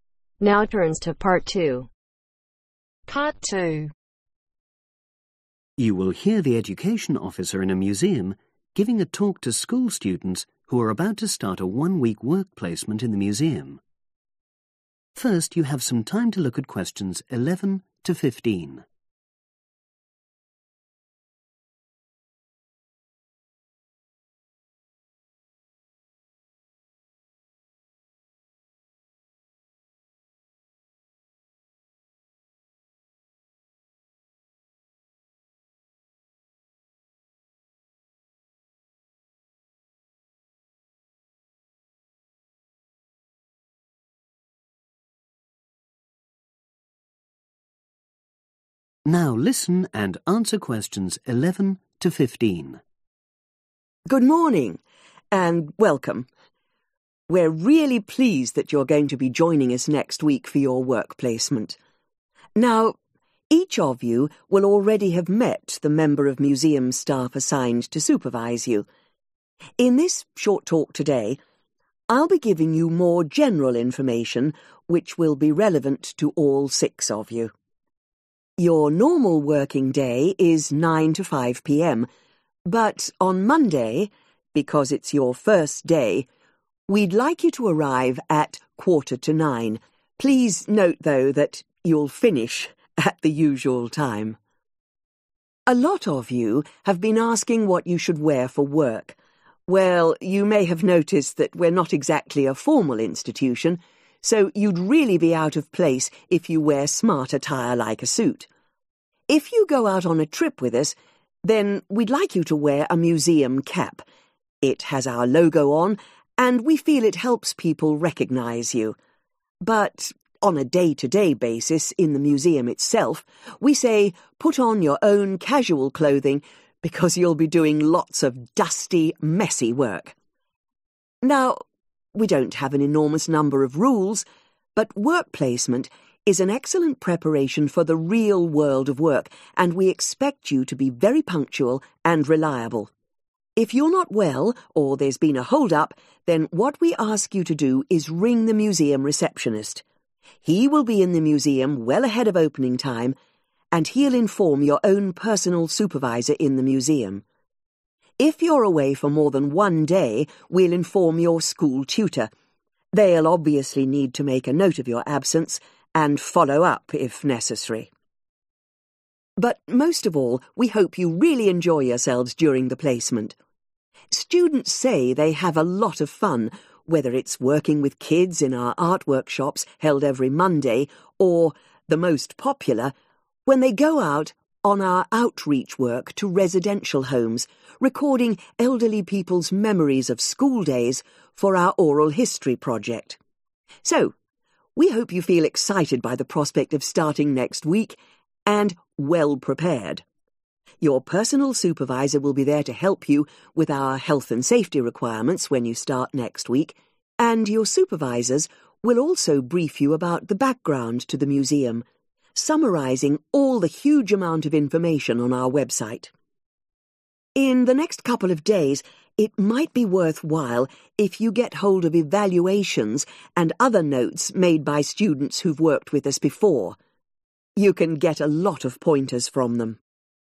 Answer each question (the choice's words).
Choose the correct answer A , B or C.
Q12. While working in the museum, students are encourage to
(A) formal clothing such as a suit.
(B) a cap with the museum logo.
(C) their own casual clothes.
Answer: their own casual clothes.

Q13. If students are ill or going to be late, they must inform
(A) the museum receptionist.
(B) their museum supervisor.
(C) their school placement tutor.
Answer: the museum receptionist.

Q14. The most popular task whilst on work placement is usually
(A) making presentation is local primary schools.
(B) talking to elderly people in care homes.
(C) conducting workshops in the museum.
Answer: talking to elderly people in care homes.

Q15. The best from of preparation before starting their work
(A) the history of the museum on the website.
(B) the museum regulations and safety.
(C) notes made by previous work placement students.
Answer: notes made by previous work placement students.